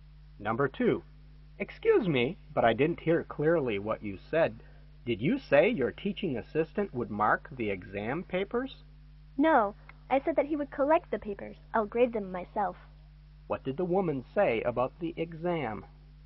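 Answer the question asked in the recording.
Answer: She will grade the papers herself, and the assistant will collect them.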